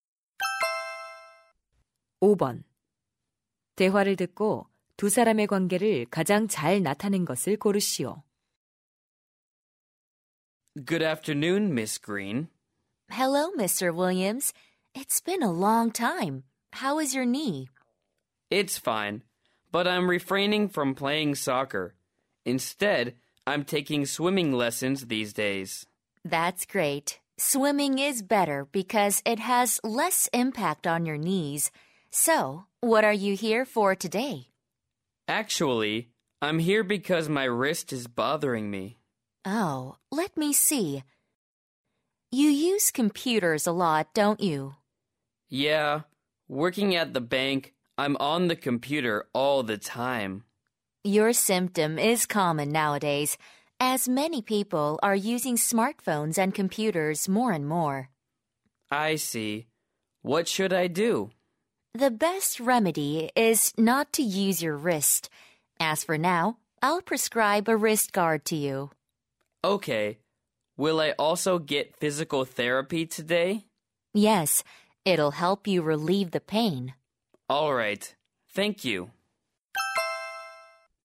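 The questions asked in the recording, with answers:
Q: 대화를 듣고 두 사람의 관계를 가장 잘 나타낸 것을 고르시오.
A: 의사 - 환자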